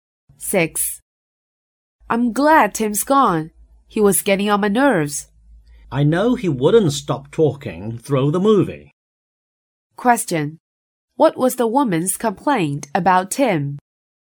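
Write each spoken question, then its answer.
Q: What was the woman's complaint about Tim?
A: He kept talking during the movie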